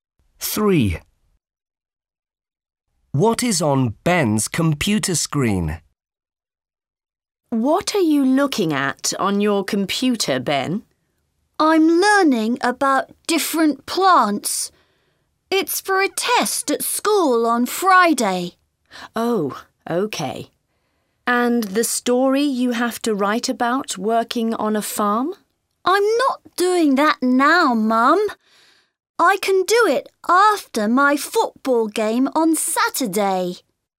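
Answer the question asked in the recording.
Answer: different plants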